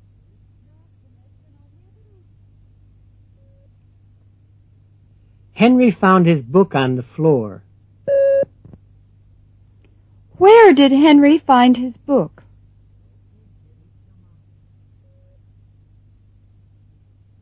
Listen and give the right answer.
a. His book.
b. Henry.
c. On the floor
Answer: c. On the floor

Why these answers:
Henry found his book on the floor. Where did Henry find his book?

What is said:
7.Henry found his book on the floor. Where did Henry find his book? (c)